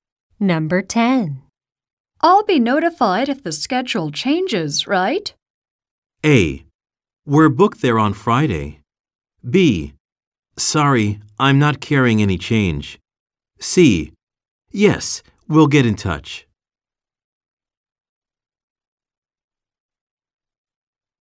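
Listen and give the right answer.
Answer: C: Yes, we'll get in touch.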